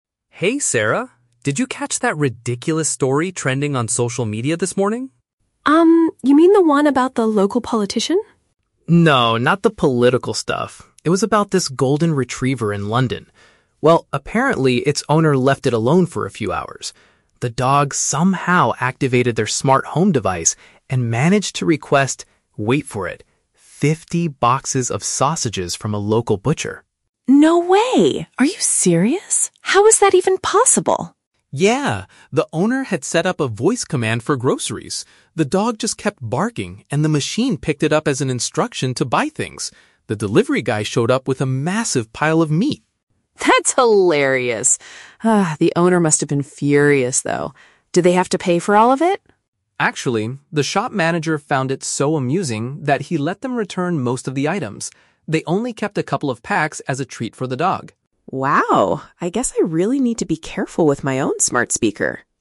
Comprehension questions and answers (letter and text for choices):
Listen to a conversation between two friends about a news story. Choose the correct answer (A, B, or C) for each question.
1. What is the main topic of the news story they are discussing?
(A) A scandal involving a local politician.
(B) A dangerous failure of a smart home security system.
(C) An animal that accidentally purchased a large amount of food.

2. How did the incident happen?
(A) The dog pressed some buttons on the owner's phone.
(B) The smart device misinterpreted the pet's noises as an order.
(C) The delivery driver delivered the package to the wrong address.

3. What was the final outcome of this situation?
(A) The owner was forced to spend a lot of money on the huge order.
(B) The store allowed the owner to give the goods back without a full charge.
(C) The shop manager adopted the dog because he found it amusing.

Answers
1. (C) An animal that accidentally purchased a large amount of food.
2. (B) The smart device misinterpreted the pet's noises as an order.
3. (B) The store allowed the owner to give the goods back without a full charge.

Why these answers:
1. The man talks about a "golden retriever" (an animal) that requested "fifty boxes of sausages" (purchased a large amount of food). Option A is the Trap: The woman mentions a "politician", but the man immediately rejects it ("No, not the political stuff"). Option B is not mentioned.
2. The script says "The dog just kept barking, and the machine picked it up as an instruction to buy things". This paraphrases option B. Option C is the Trap: The delivery guy is mentioned ("The delivery guy showed up..."), but he didn't make a mistake; he just did his job. Option A is plausible in real life but not mentioned in the audio.
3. The man explains that the shop manager "let them return most of the items" and they only kept a few. Option A is the Trap: The woman asks if they had to pay for all of it, but the man says no. Option C uses the word "amusing" from the script to trick the listener, but the manager didn't adopt the dog.

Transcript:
Man: Hey, Sarah. Did you catch that ridiculous story trending on social media this morning?
Woman: Um, you mean the one about the local politician?
Man: No, not the political stuff. It was about this golden retriever in London. Well, apparently, its owner left it alone for a few hours. The dog somehow activated their smart home device and managed to request... wait for it... fifty boxes of sausages from a local butcher.
Woman: No way! Are you serious? How is that even possible?
Man: Yeah! The owner had set up a voice command for groceries. The dog just kept barking, and the machine picked it up as an instruction to buy things. The delivery guy showed up with a massive pile of meat.
Woman: That's hilarious! Ah, the owner must have been furious, though. Did they have to pay for all of it?
Man: Actually, the shop manager found it so amusing that he let them return most of the items. They only kept a couple of packs as a treat for the dog.